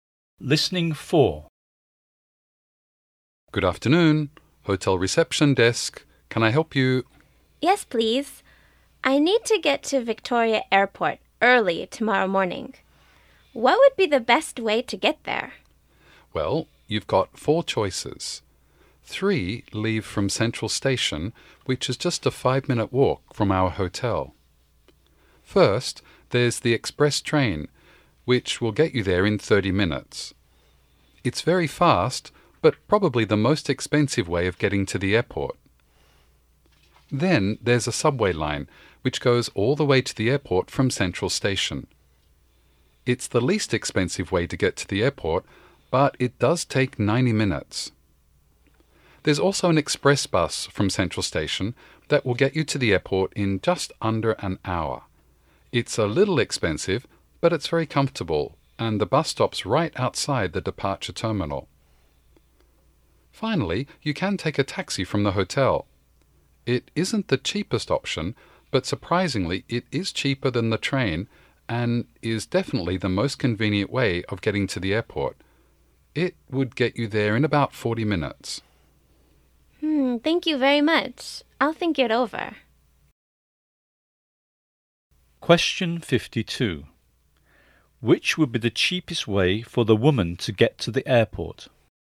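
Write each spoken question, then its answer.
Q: Which would be the cheapest way for the woman to get to the airport?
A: The subway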